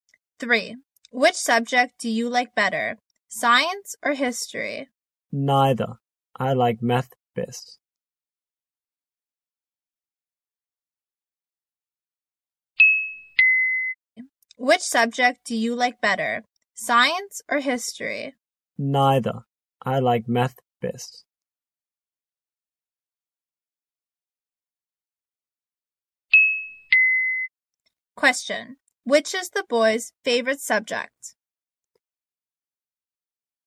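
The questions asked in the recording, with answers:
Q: Which is the boy's favorite subject?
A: Math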